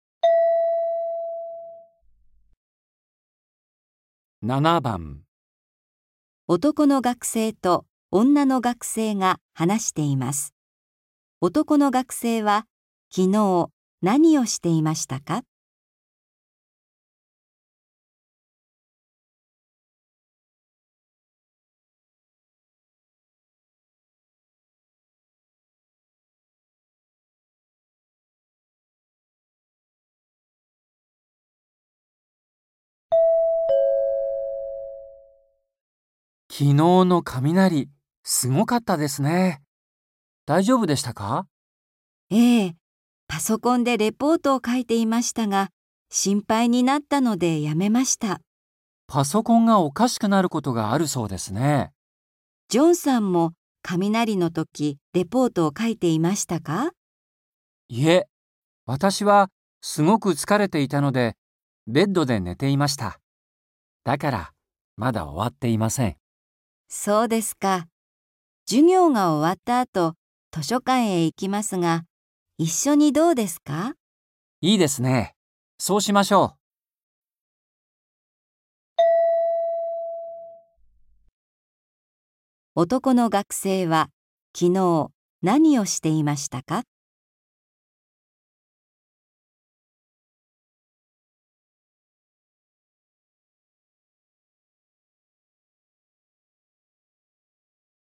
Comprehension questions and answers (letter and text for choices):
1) 男の学生は、昨日何をしていましたか。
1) パソコンを 直して いた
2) レポートを 書いて いた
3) ベッドで 寝て いた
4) 図書館で 勉強して いた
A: 3) ベッドで 寝て いた

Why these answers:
いえ、私はすぐ疲れていたのでベッドで寝ていました。

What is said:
M: 昨日の雪、すごかったですね。大丈夫でしたか。
F: ええ、パソコンでレポートを書いていましたが、心配になったのでやめました。
M: パソコンがおかしくなることがあるそうですね。
M: いえ、私はすぐ疲れていたのでベッドで寝ていました。だから、まだ終わっていません。
F: そうですか。授業が終わった後、図書館へ行きますが、一緒にどうですか。
M: いいですね。そうしましょう。

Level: 初級